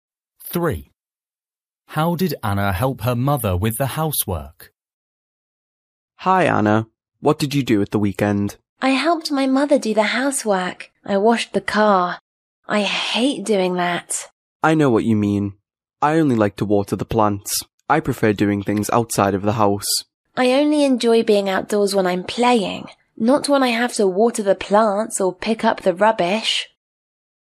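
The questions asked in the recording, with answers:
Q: How did Anna help her mother with the housework?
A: She washed the car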